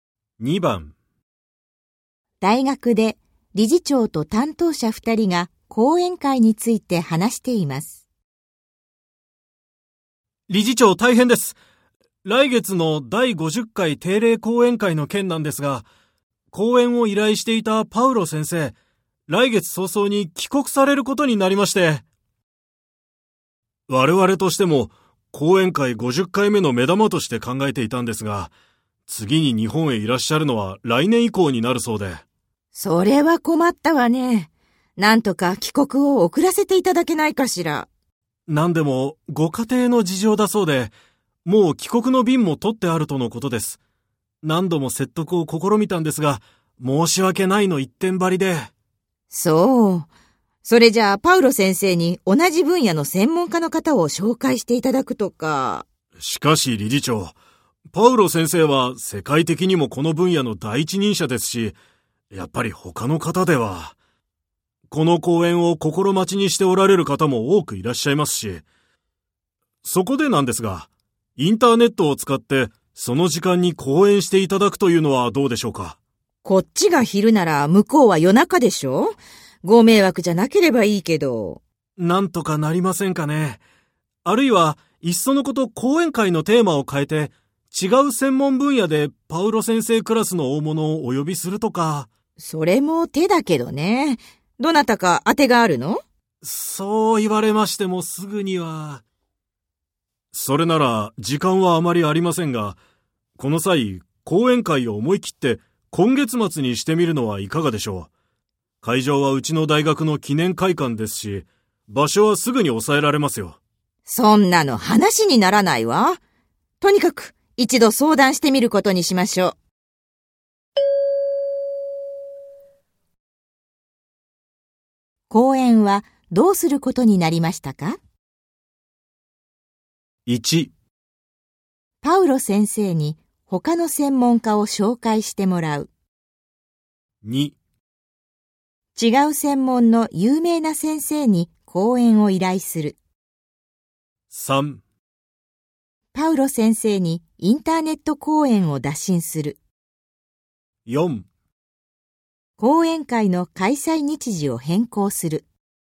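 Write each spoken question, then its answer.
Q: 講演はどうすることになりましたか?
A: 3: パウロ先生にインターネット講演を打診する。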